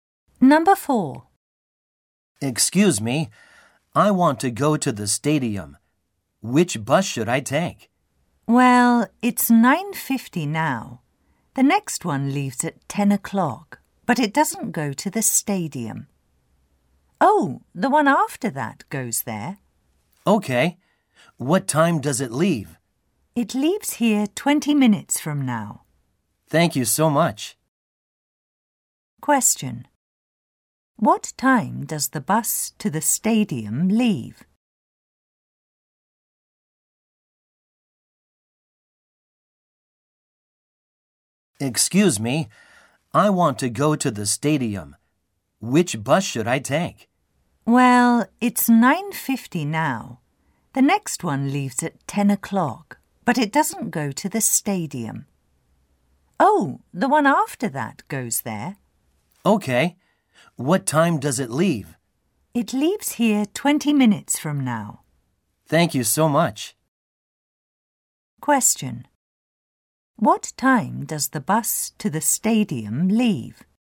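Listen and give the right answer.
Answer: At 10:10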